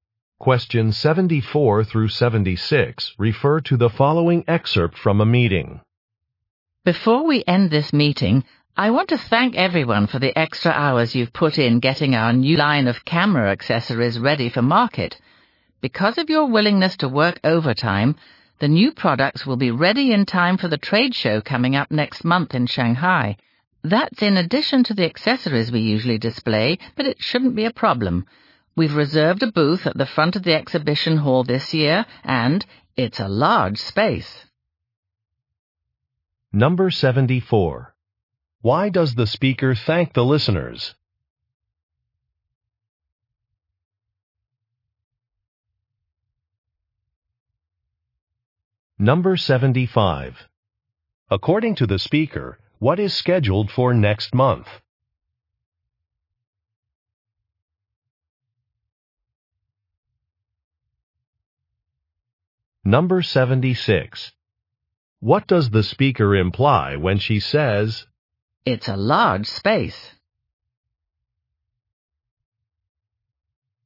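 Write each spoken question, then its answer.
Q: Why does the speaker thank the listeners?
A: For working overtime

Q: According to the speaker, what is scheduled for next month?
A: A trade show in Shanghai

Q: What does the speaker imply when she says,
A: There will be enough room to display the extra products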